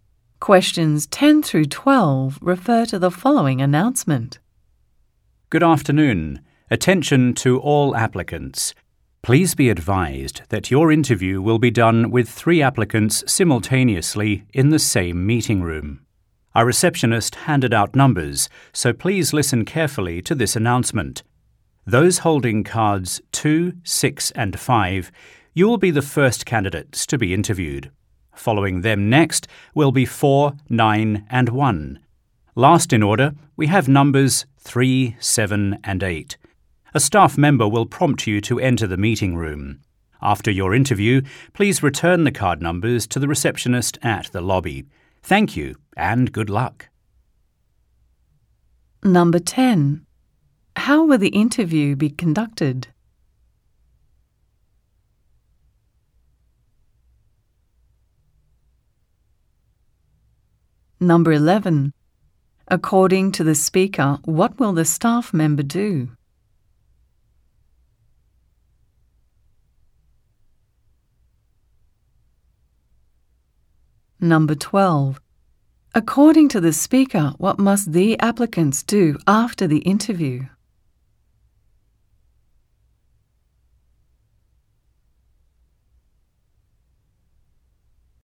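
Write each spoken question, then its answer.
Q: How will the interview be conducted?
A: With 3 applicants at the same time in the same meeting room

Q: According to the speaker, what will the staff member do?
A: Tell the applicants when to enter the meeting room

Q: According to the speaker, what must the applicants do after the interview?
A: Give their number cards back to the receptionist in the lobby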